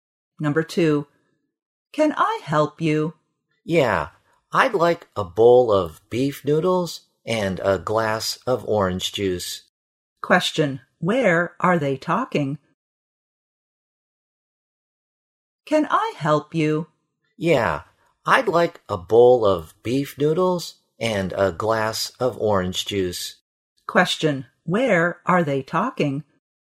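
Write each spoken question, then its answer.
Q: where are they talking?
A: In a restaurant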